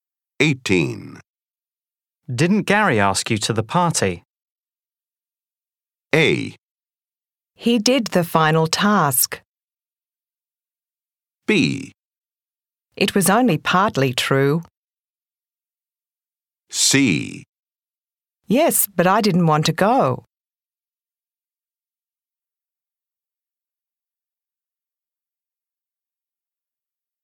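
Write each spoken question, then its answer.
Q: Didn't Gary ask you to the party?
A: C: Yes, but I didn't want to go.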